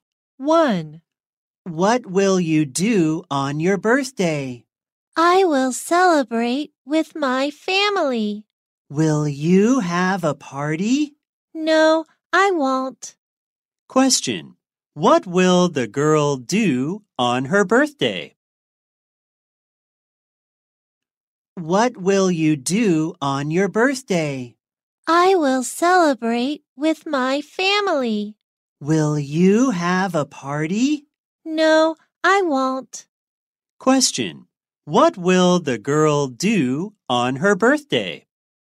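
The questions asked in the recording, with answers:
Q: What will the girl do on her birthday?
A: Celebrate with her family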